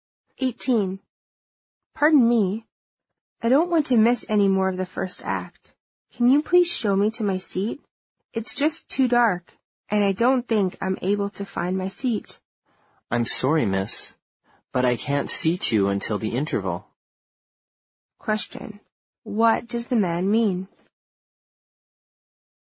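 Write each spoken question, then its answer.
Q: What does the man mean?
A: She has to wait until the interval to be seated.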